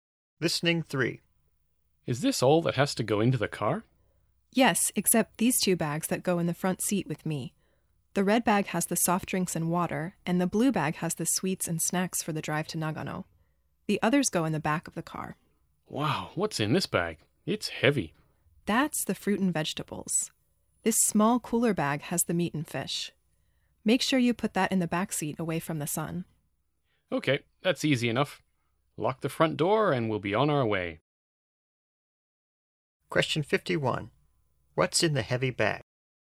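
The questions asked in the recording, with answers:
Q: What's in the heavy bag?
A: Fruit and vegetables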